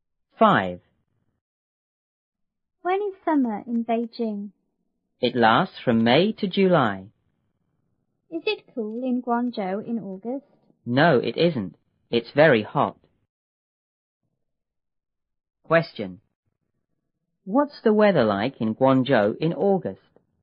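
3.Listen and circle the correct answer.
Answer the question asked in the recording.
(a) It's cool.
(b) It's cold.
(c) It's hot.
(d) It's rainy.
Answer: (c) It's hot.

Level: 六年级下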